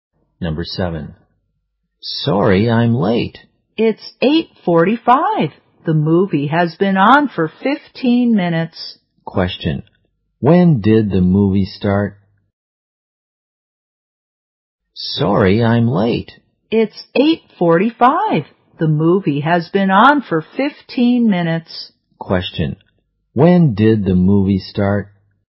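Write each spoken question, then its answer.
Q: when did the movie start?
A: At 8:30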